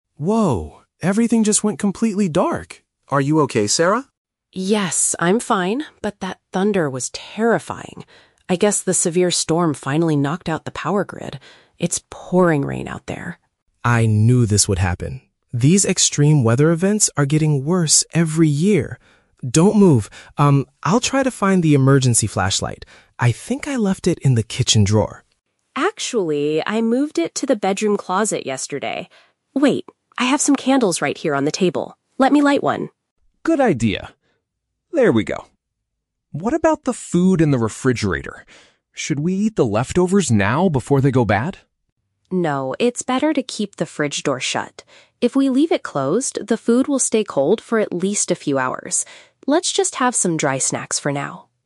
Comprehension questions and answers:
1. What is the main cause of the power outage?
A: An unusually violent weather event.

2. Where is the emergency flashlight currently located?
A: In the bedroom closet.

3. What does Sarah suggest doing about the food in the refrigerator?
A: Keeping the door closed to maintain the cold temperature.

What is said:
David: Whoa! Everything just went completely dark. Are you okay, Sarah?
Sarah: Yes, I'm fine, but that thunder was terrifying! I guess the severe storm finally knocked out the power grid. It's pouring rain out there.
David: I knew this would happen. These extreme weather events are getting worse every year. Don't move, um, I'll try to find the emergency flashlight. I think I left it in the kitchen drawer.
Sarah: Actually, I moved it to the bedroom closet yesterday. Wait, I have some candles right here on the table. Let me light one.
David: Good idea. (Pause) There we go. What about the food in the refrigerator? Should we eat the leftovers now before they go bad?
Sarah: No, it's better to keep the fridge door shut. If we leave it closed, the food will stay cold for at least a few hours. Let's just have some dry snacks for now.